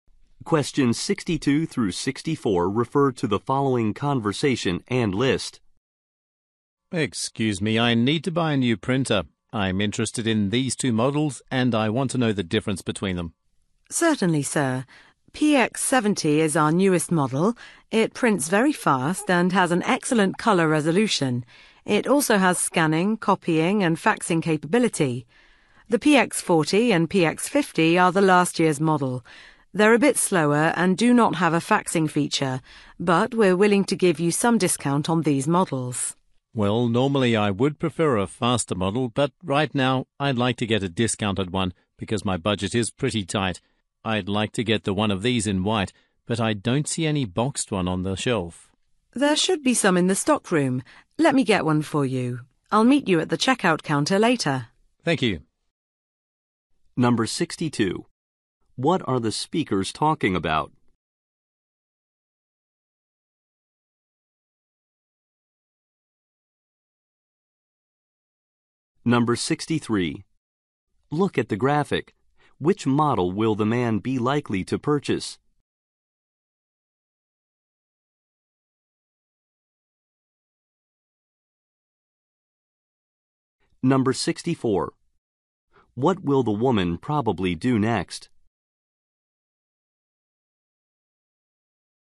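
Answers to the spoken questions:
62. Printers
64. Get a printer from the stockroom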